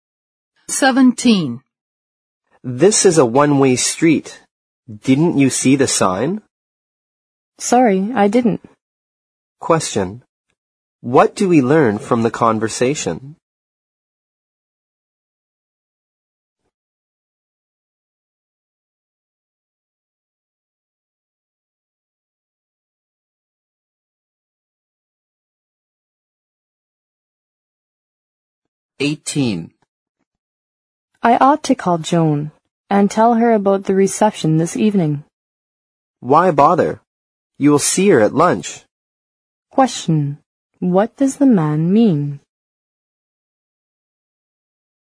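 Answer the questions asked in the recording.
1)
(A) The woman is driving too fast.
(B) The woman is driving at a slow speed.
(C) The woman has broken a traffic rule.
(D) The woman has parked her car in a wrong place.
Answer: (C) The woman has broken a traffic rule.
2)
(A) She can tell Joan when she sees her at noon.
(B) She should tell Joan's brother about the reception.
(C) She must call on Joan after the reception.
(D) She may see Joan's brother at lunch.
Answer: (A) She can tell Joan when she sees her at noon.

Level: 四级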